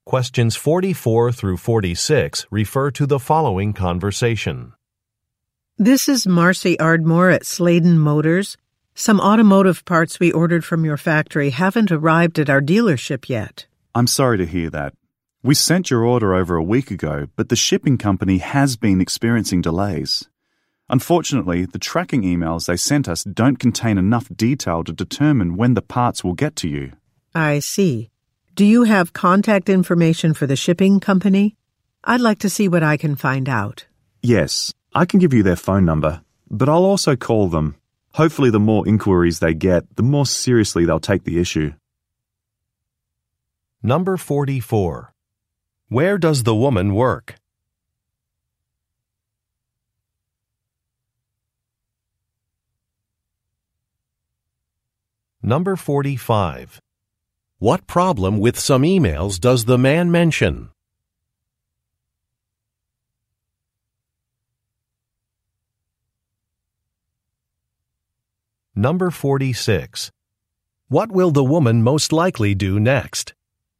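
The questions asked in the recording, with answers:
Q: Where does the woman work?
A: At a car dealership (Sladen Motors)

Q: What problem with some emails does the man mention?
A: The tracking emails don't contain enough detail to tell when the parts will arrive

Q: What will the woman most likely do next?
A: Contact the shipping company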